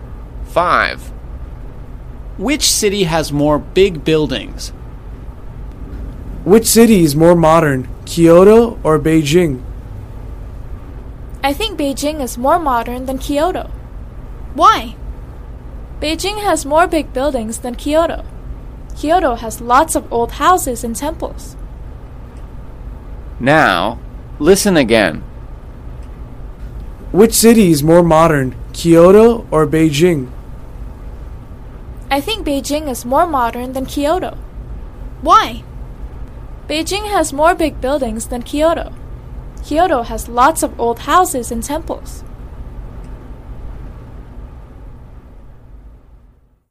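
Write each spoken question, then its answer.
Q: Which city has more big buildings?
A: Beijing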